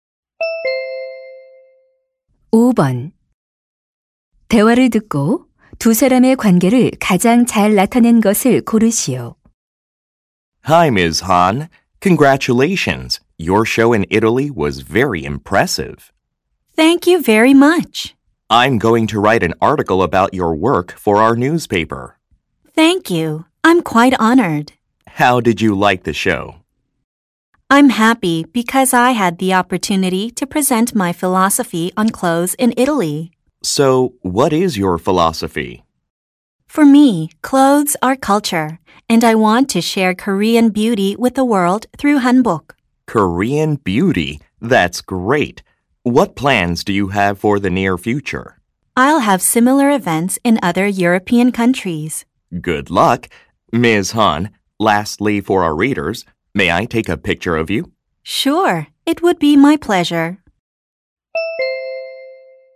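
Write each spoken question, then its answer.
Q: 두 사람의 관계를 가장 잘 나타낸 것을 고르시오.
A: 신문 기자 — 한복 디자이너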